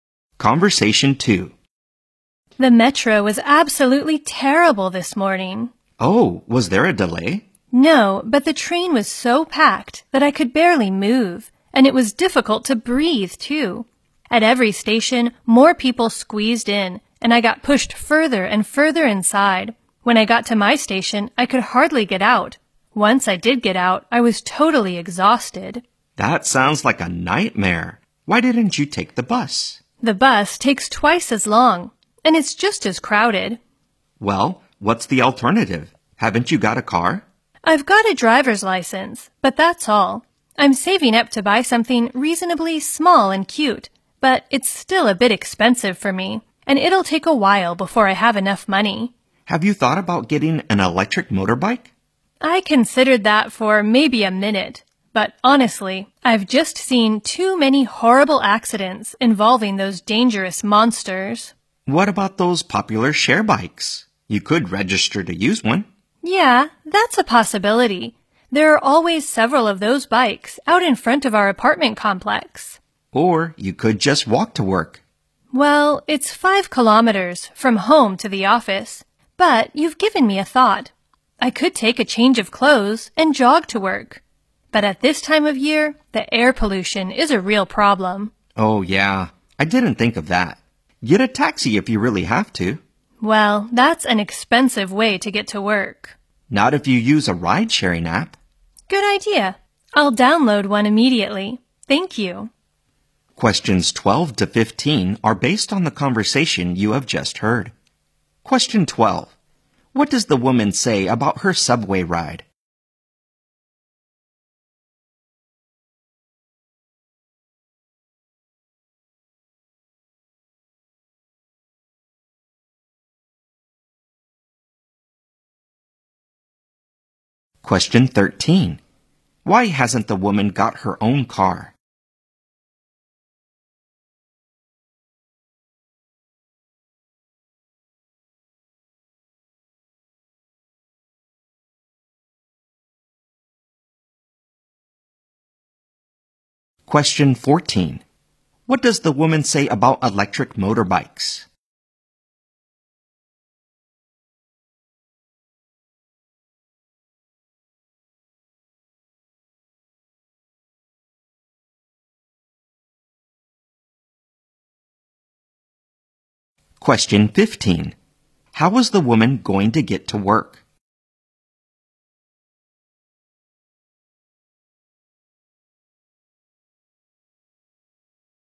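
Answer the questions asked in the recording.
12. The train was so packed she could barely move
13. She can't afford one yet; she's still saving
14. They are dangerous; she's seen too many horrible accidents
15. By taxi using a ride-sharing app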